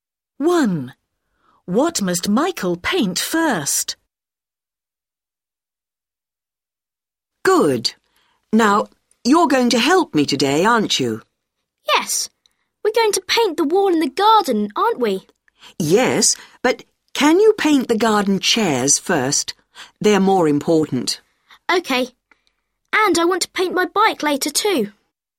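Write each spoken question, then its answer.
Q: What must Michael paint first?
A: the garden chairs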